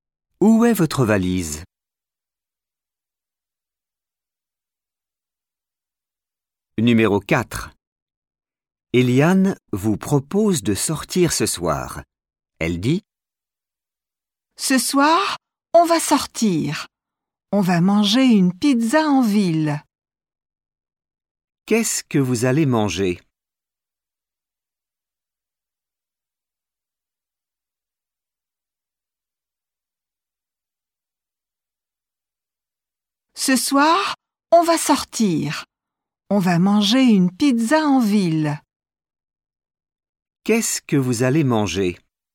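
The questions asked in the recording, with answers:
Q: Qu'est-ce que vous allez manger ?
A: Une pizza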